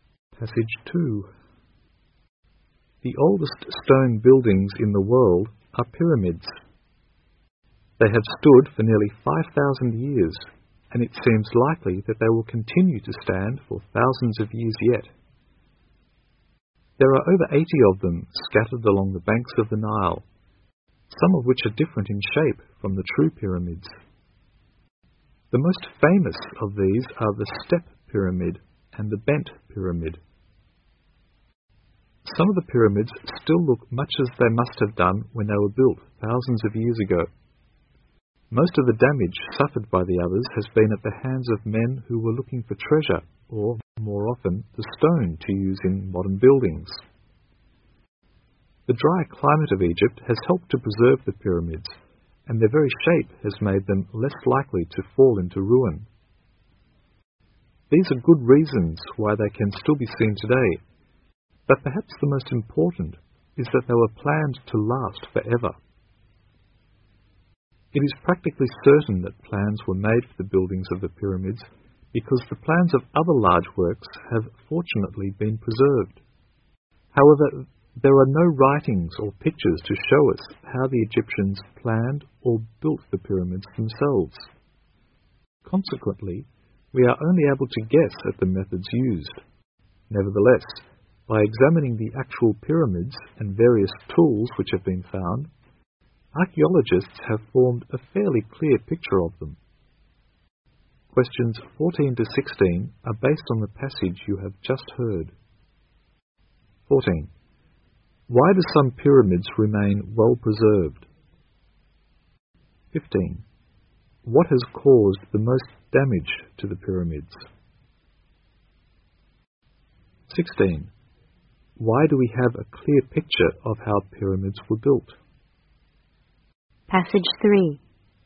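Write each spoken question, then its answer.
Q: Why do some pyramids remain well preserved?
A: The dry climate, their shape, and they were planned to last forever

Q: What has caused the most damage to the pyramids?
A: Men looking for treasure or stone for modern buildings

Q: Why do we have a clear picture of how pyramids were built?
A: Archaeologists examined the pyramids and tools that were found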